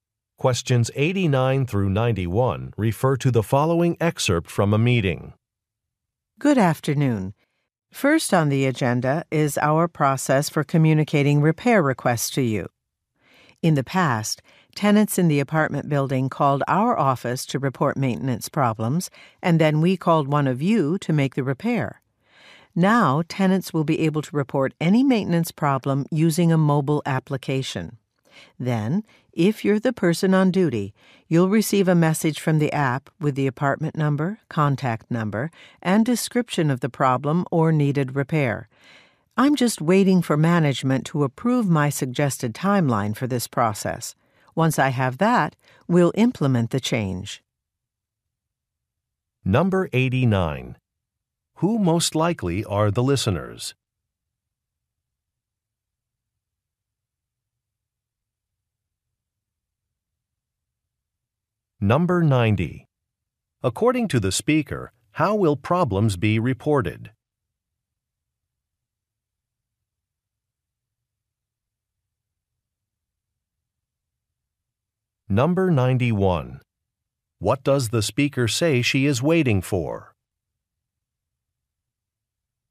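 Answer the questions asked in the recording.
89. Maintenance workers
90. Using a mobile application
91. Management approval of her suggested timeline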